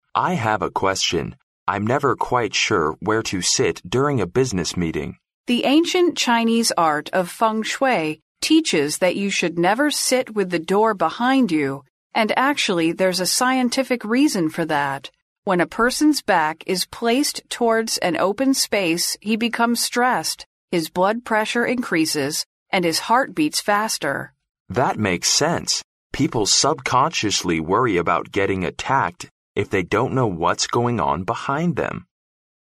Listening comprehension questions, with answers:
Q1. What are the speakers talking about?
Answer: A practical interpretation of Feng Shui .

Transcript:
M: I have a question. I'm never quite sure where to sit during a business meeting.
W: The ancient Chinese art"Feng Shui"teaches that you should never sit with the door behind you-and actually there's a scientific reason for that. When a person's back is placed towards an open space he becomes stressed; his blood pressure increases and his heart beats faster.
M: That makes sense! People subconsciously worry about getting attacked if they don't know what's going on behind them.

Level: C类